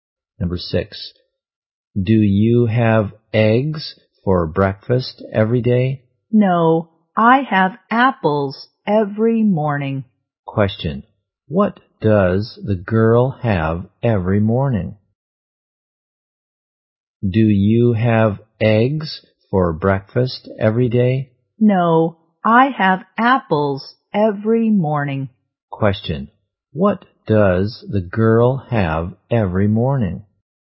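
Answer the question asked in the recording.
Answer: Apples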